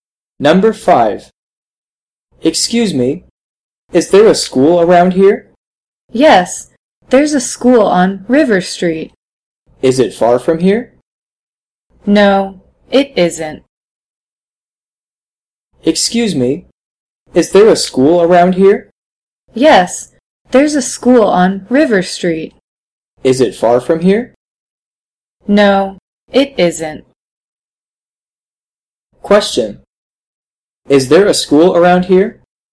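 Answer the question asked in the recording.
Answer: Yes, there is.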